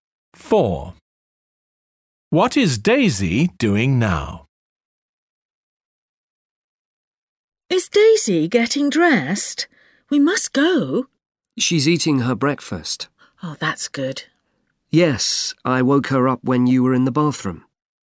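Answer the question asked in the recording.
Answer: Eating her breakfast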